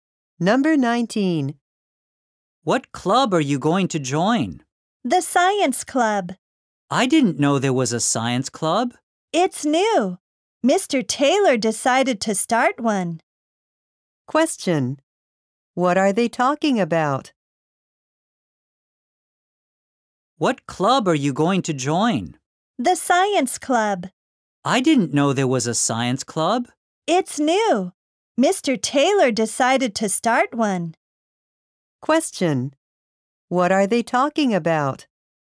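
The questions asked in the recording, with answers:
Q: What are they talking about?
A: A new science club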